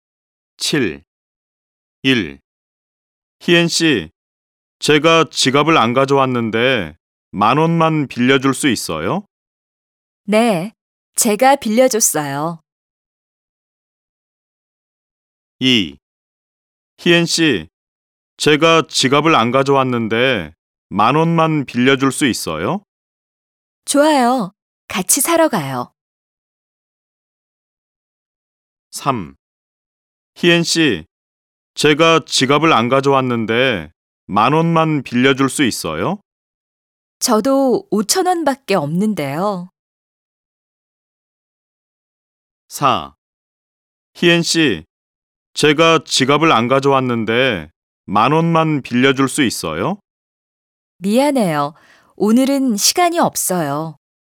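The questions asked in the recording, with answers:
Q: 희엔 씨, 제가 지갑을 안 가져왔는데 만 원만 빌려줄 수 있어요?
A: 3: 저도 5천 원밖에 없는데요.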